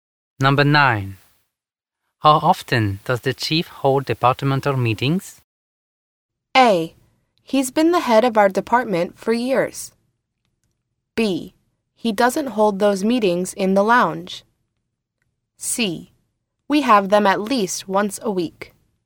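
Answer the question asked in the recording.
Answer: C: We have them at least once a week.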